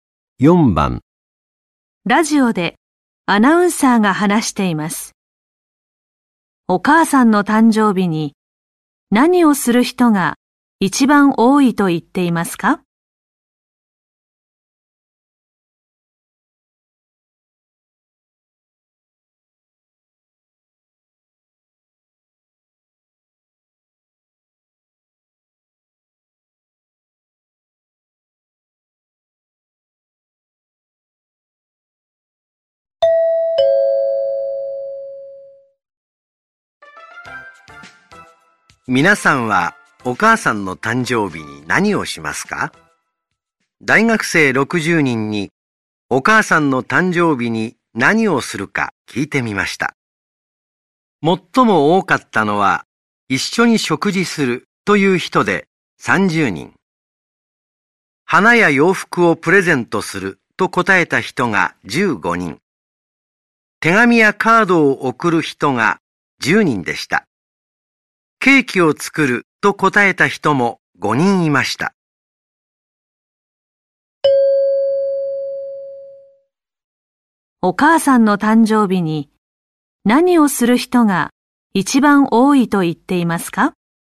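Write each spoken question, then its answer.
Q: お母さんの誕生日に何をする人が一番多いと言っていますか?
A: 一緒に食事する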